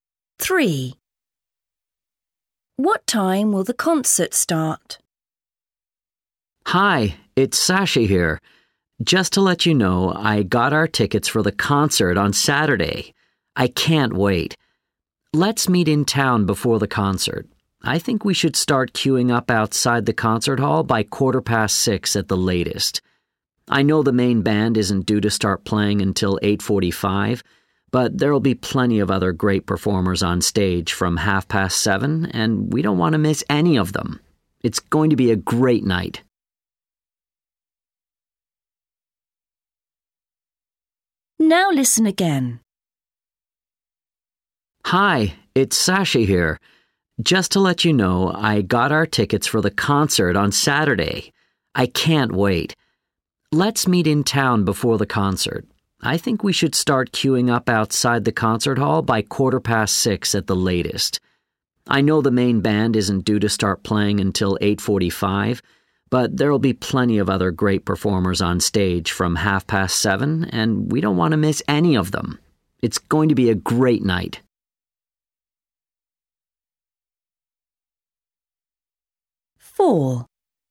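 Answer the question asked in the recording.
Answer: 7:30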